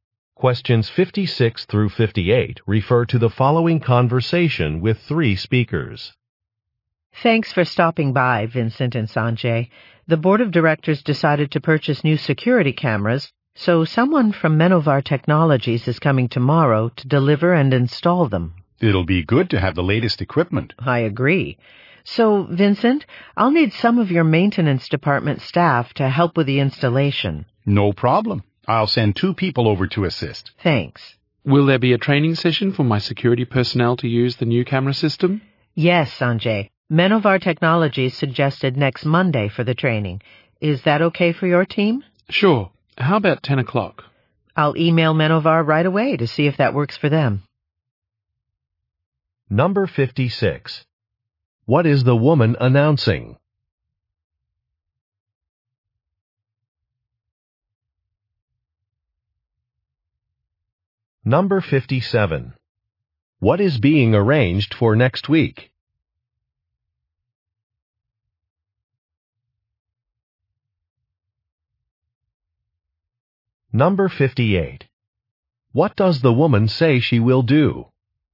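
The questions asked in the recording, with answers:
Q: What is the woman announcing?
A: The purchase of new security cameras

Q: What is being arranged for next week?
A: A training session

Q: What does the woman say she will do?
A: Email Menovar Technologies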